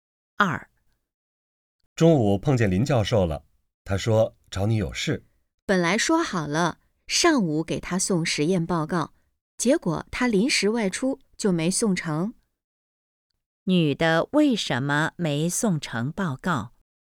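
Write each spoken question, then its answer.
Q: 女的为什么没送成报告?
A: 林教授临时外出了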